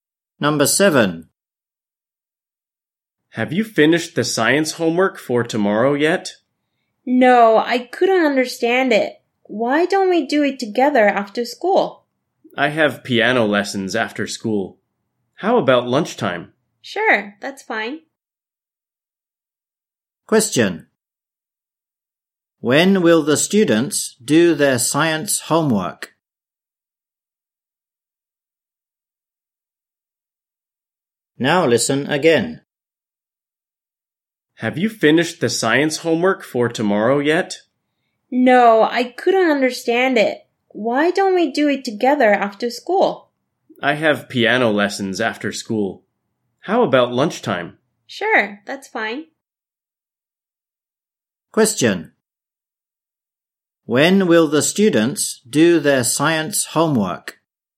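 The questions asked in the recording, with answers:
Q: When will the students do their science homework?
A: At lunchtime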